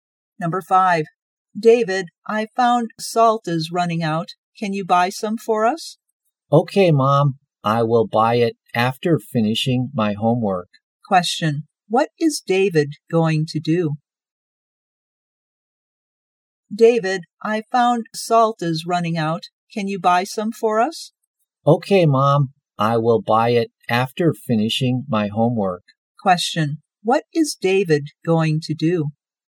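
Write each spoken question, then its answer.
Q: Question, what is David going to do?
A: Finish his homework, then buy salt.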